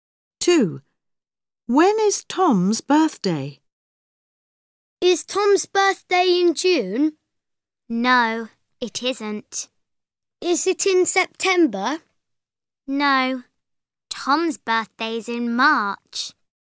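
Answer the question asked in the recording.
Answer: In March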